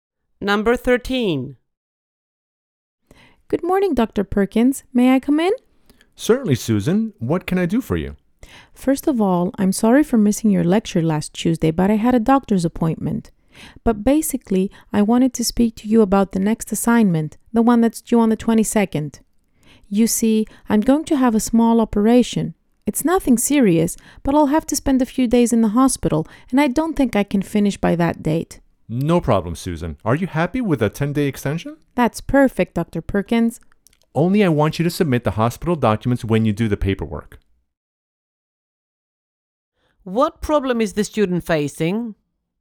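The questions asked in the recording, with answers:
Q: What problem is the student facing?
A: She can't finish her assignment on time because of an operation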